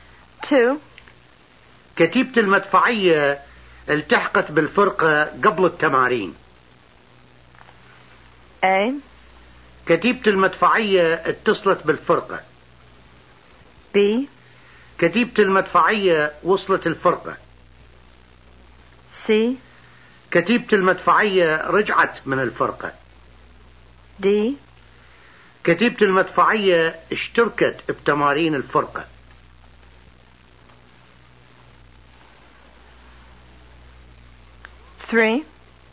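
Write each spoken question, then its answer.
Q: كتيبة المدفعية التحقت بالفرقة قبل التمارين.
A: B: كتيبة المدفعية وصلت الفرقة.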